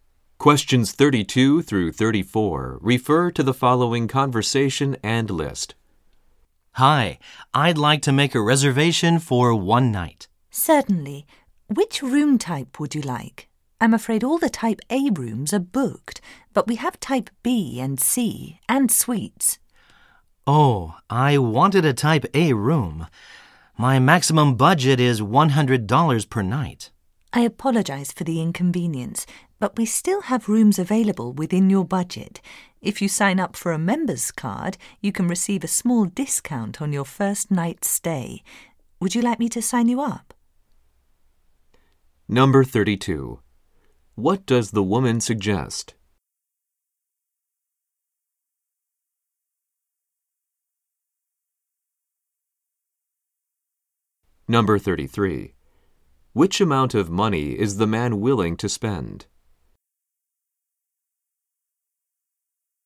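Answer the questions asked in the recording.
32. Signing up for a member's card to get a discount
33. $100 per night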